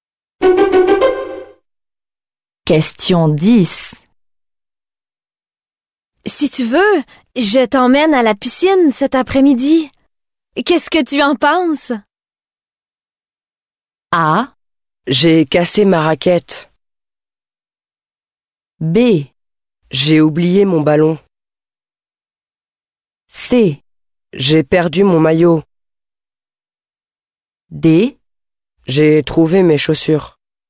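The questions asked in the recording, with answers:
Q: Si tu veux, je t'emmène à la piscine cet après-midi. Qu'est-ce que tu en penses?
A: C: J'ai perdu mon maillot.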